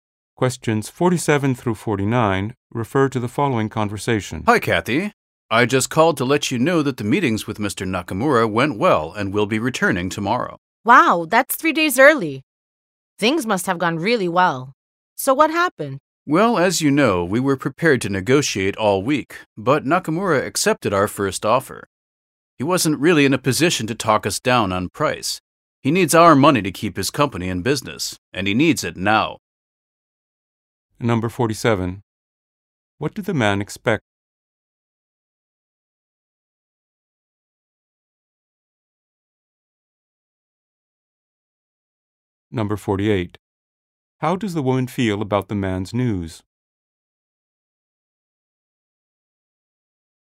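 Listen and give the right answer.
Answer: To negotiate all week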